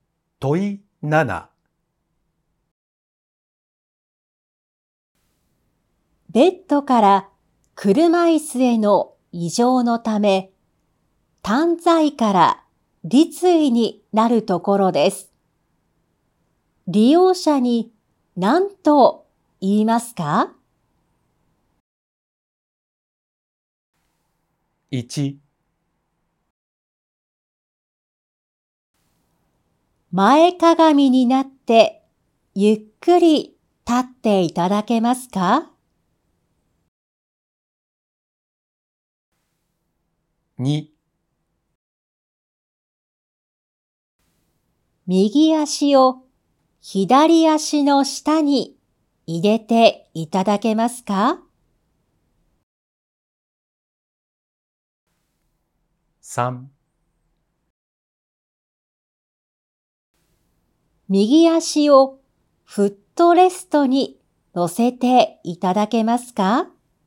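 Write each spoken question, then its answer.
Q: 利用者に何と言いますか?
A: 1: 前かがみになってゆっくり立っていただけますか?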